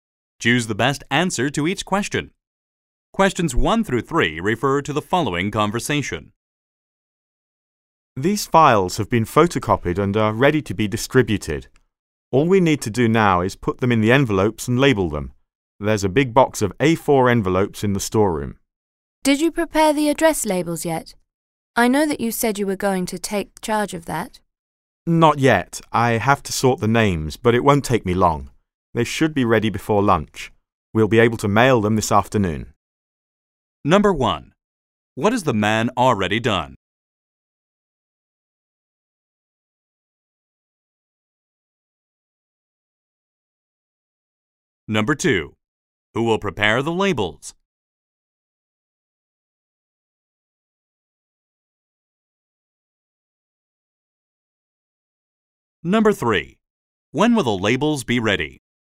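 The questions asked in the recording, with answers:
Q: When will the labels be ready?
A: Before lunch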